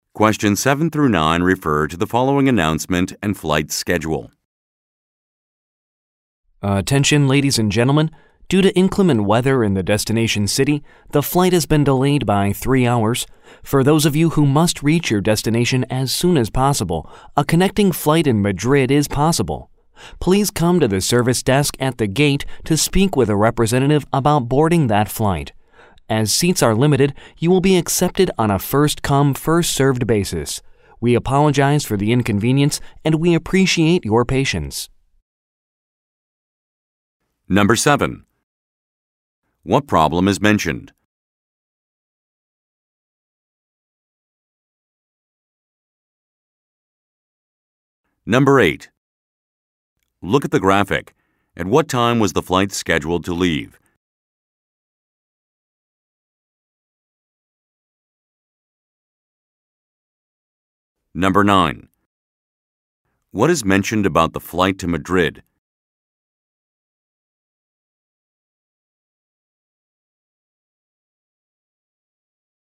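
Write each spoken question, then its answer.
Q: What problem is mentioned?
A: The flight is delayed 3 hours because of bad weather

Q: What is mentioned about the flight to Madrid?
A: Seats are limited, first-come, first-served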